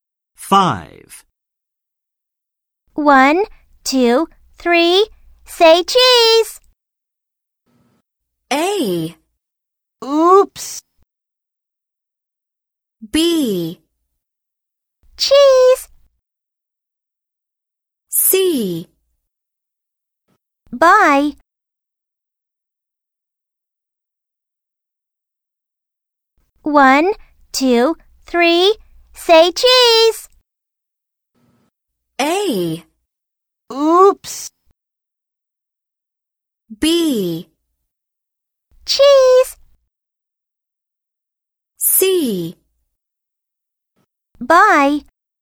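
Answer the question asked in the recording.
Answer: B: Cheese.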